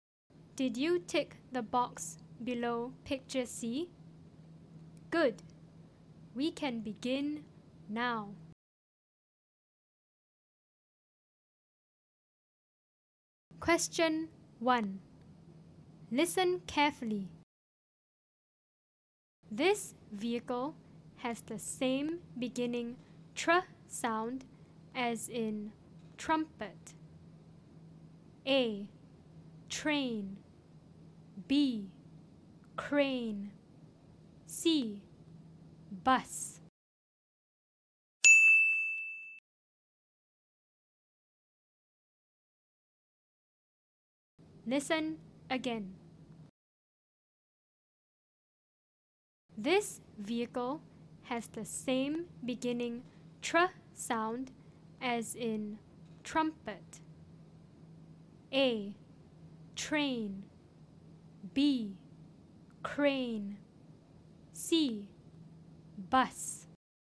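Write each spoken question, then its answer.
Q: This vehicle has the same beginning tr sound as in trumpet.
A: A: Train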